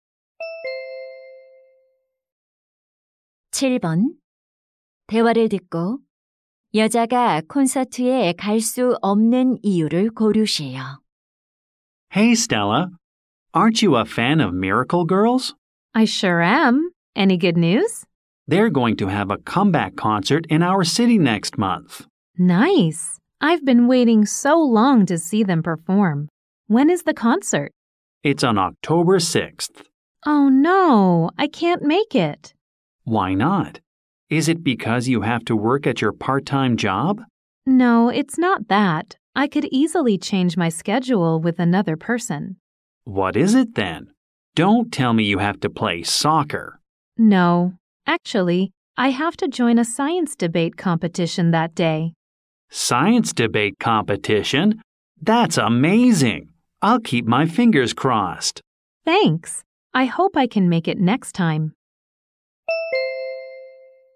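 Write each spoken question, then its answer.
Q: 여자가 콘서트에 갈 수 없는 이유를 고르세요.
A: 과학 토론 대회에 참가해야 해서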